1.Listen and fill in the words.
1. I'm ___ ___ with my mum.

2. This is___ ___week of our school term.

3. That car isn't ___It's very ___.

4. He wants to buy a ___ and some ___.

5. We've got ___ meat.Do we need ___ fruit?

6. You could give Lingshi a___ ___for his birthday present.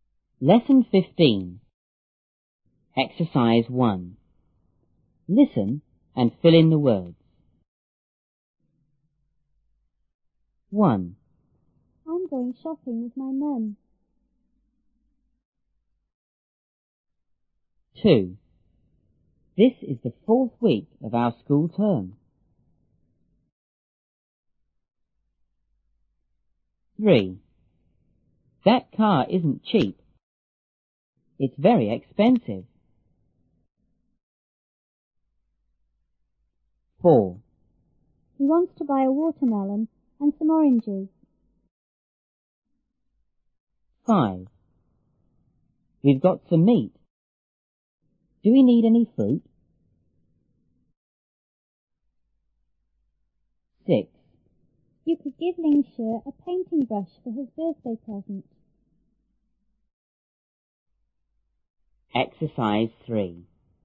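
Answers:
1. going shopping
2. the fourth
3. cheap, expensive
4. watermelon, oranges
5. some, any
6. painting brush

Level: 初中英语广州版1B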